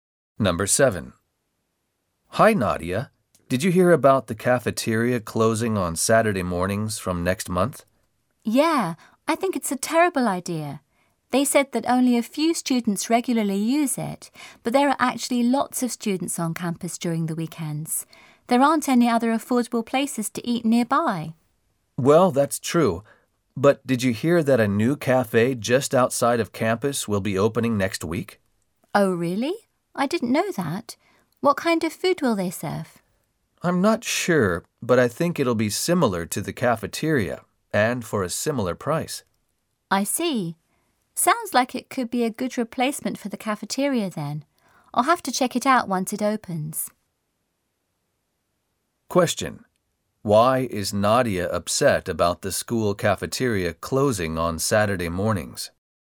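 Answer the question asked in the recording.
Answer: Lots of students are on campus at weekends and there are no other affordable places to eat nearby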